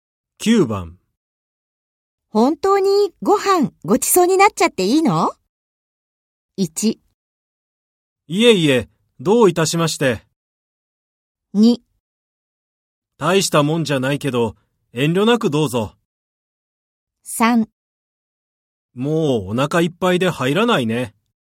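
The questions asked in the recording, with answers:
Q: 本当にご飯ごちそうになっちゃっていいの?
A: 2: 大したもんじゃないけど、遠慮なくどうぞ。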